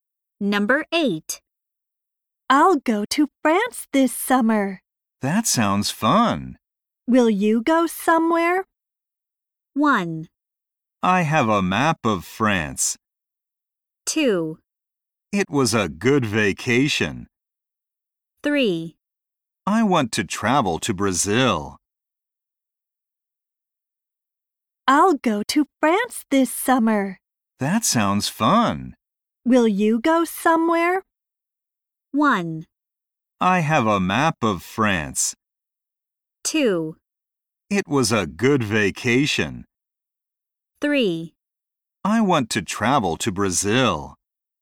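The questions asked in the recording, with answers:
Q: Will you go somewhere?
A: 3: I want to travel to Brazil.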